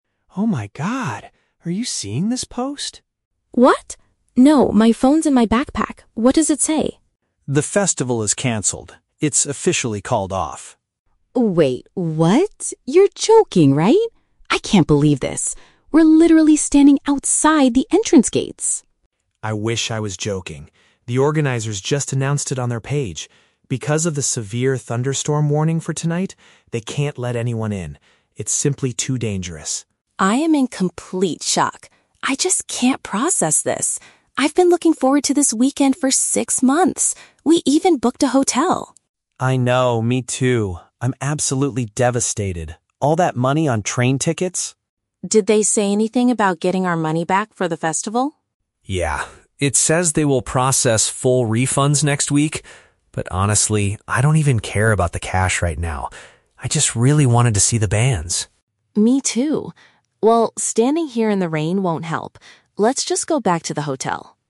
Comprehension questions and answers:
Listen to a conversation between two music fans, Mark and Lily. Choose the correct answer (A, B, or C) for each question.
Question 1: Why is Lily finding the news so hard to believe?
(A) Because she didn't check her own phone.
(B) Because they have already arrived at the venue.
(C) Because they spent a lot of money on their hotel.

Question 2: What is the exact reason for the event's cancellation?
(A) Extreme weather predictions.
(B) An issue with the entrance gates.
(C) The bands could not arrive on time.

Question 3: How does Mark feel about the ticket refunds?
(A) He is worried they will not receive their money next week.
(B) He wants to use the refund to pay for their expensive train tickets.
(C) He is more upset about missing the performances than losing money.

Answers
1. (B) Because they have already arrived at the venue.
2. (A) Extreme weather predictions.
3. (C) He is more upset about missing the performances than losing money.

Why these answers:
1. Lily says she can't believe it because they are "literally standing outside the entrance gates." Option (B) uses "arrived at the venue" to paraphrase this. Option (A) is a trap; her phone is in her bag, but that's not why she is shocked. Option (C) is a trap; the hotel is mentioned as a reason she was excited, not the reason she finds the news hard to believe right now.
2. Mark states the festival was called off due to a "severe thunderstorm warning." Option (A) is a perfect paraphrase. Option (B) is a trap using the word "gates" from earlier in the audio. Option (C) is a plausible reason for a concert cancellation, but it was not mentioned in the dialogue.
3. Mark explicitly states, "I don't even care about the cash right now. I just really wanted to see the bands." Option (C) captures this sentiment perfectly. Option (A) is a trap; refunds will be processed next week, but he is not worried about it. Option (B) is a trap; he mentions train tickets earlier to show his frustration, not as a plan for the refund.

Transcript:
Mark: Oh my god. Are you seeing this post?
Lily: What? No, my phone's in my backpack. What does it say?
Mark: The festival is canceled. It's officially called off.
Lily: Wait, what? You're joking, right? I can't believe this... we're literally standing outside the entrance gates!
Mark: I wish I was joking. The organizers just announced it on their page. Because of the severe thunderstorm warning for tonight, they can't let anyone in. It's simply too dangerous.
Lily: I am in complete shock. I just can't process this. I've been looking forward to this weekend for six months! We even booked a hotel.
Mark: I know, me too. I'm absolutely devastated. All that money on train tickets...
Lily: Did they say anything about getting our money back for the festival?
Mark: Yeah, it says they will process full refunds next week. But honestly, I don't even care about the cash right now. I just really wanted to see the bands.
Lily: Me too. Well, standing here in the rain won't help. Let's just go back to the hotel.

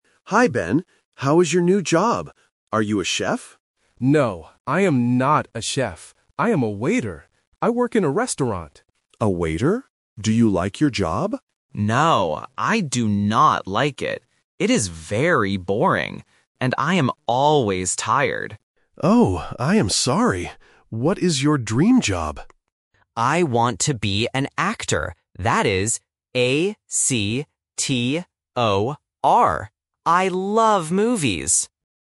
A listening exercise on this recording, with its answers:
Listen to the conversation between two friends. Choose the correct answer (A, B, or C) for each question.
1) What is Ben's job now?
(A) A chef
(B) A waiter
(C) An actor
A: (B) A waiter

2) How does Ben feel about his job?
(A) It is boring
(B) It is fun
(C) It is great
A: (A) It is boring

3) How do you spell Ben's dream job?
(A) A-C-T-E-R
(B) A-C-T-O-R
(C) A-K-T-O-R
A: (B) A-C-T-O-R

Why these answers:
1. Ben clearly states: "I am a waiter." Option (A) is a trap because Alex asks "Are you a chef?", but Ben says "No, I am not." Option (C) is the job Ben wants in the future, not his job now.
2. When Alex asks if he likes his job, Ben says: "No, I do not like it. It is very boring." Options (B) and (C) are positive feelings, which are incorrect.
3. Ben spells the word very clearly: "A-C-T-O-R". Options (A) and (C) are distractors with incorrect vowels or consonants.

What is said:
Alex: Hi, Ben. How is your new job? Are you a chef?
Ben: No, I am not a chef. I am a waiter. I work in a restaurant.
Alex: A waiter? Do you like your job?
Ben: No, I do not like it. It is very boring. And I am always tired.
Alex: Oh, I am sorry. What is your dream job?
Ben: I want to be an actor. That is A-C-T-O-R. I love movies!

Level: A1

